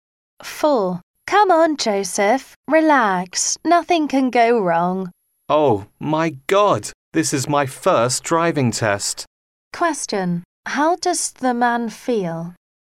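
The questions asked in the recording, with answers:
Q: How does the man feel?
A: Nervous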